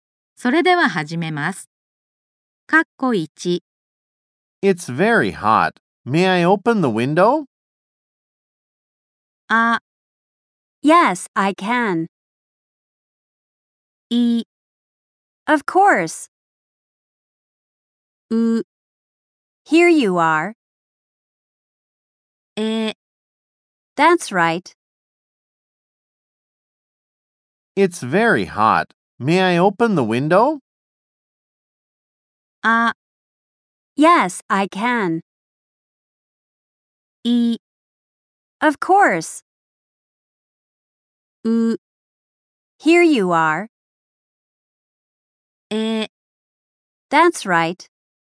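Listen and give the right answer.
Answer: い: Of course.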